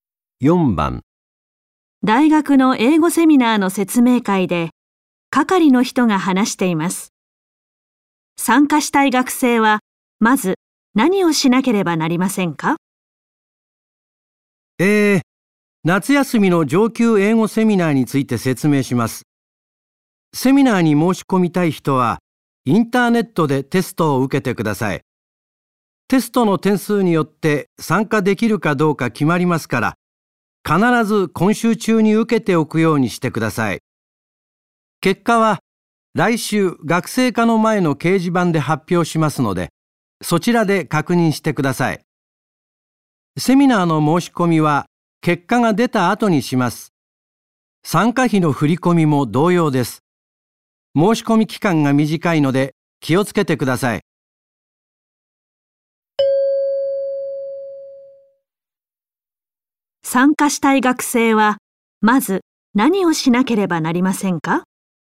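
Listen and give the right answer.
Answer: インターネットでテストを受ける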